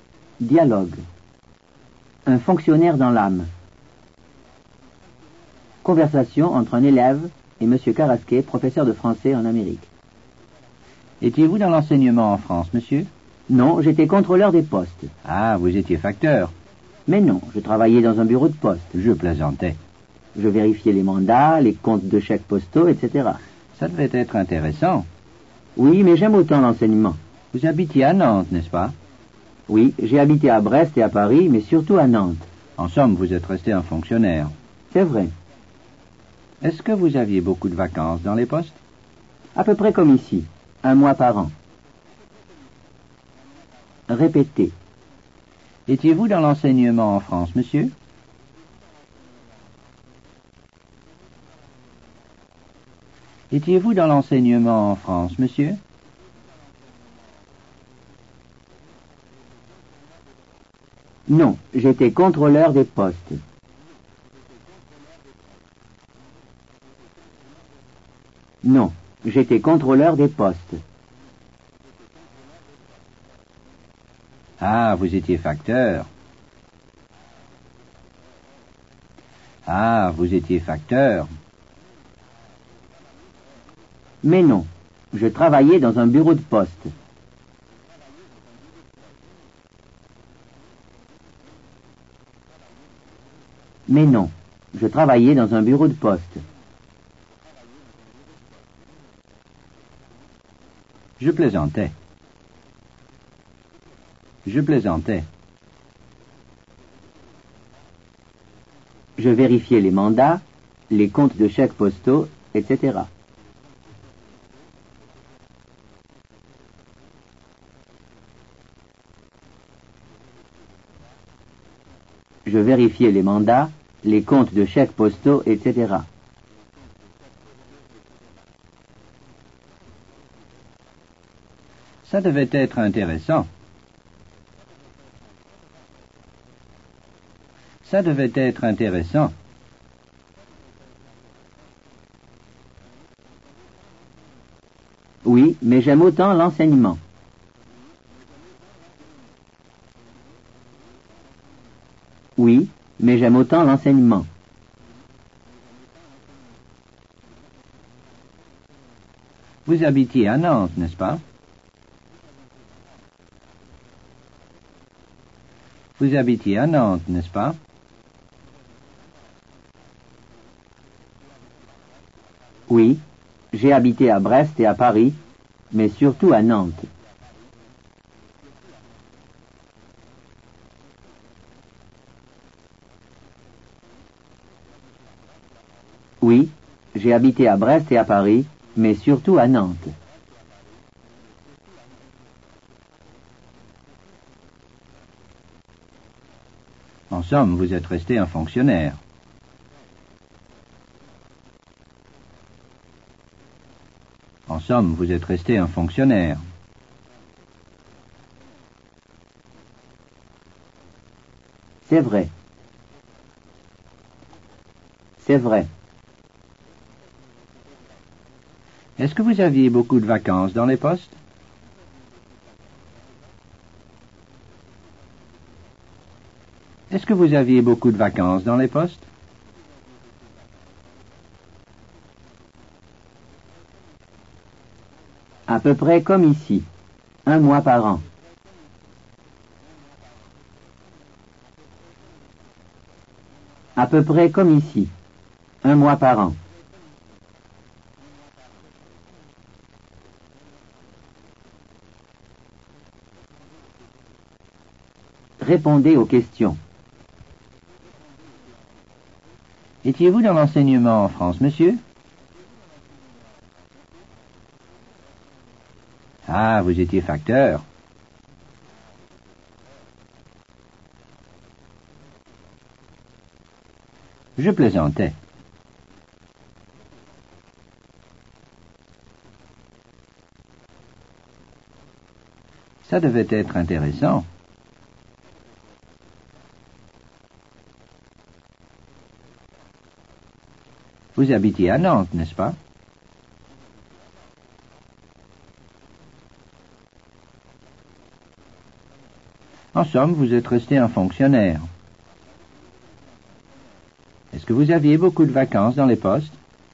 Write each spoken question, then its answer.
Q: Étiez-vous dans l'enseignement en France, monsieur?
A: Non, j'étais contrôleur des postes.

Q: Ah, vous étiez facteur.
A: Mais non, je travaillais dans un bureau de poste.

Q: Ça devait être intéressant.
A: Oui, mais j'aime autant l'enseignement.

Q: Vous habitiez à Nantes, n'est-ce pas?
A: Oui, j'ai habité à Brest et à Paris, mais surtout à Nantes.

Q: En somme, vous êtes resté un fonctionnaire.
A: C'est vrai.

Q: Est-ce que vous aviez beaucoup de vacances dans les postes?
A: À peu près comme ici, un mois par an.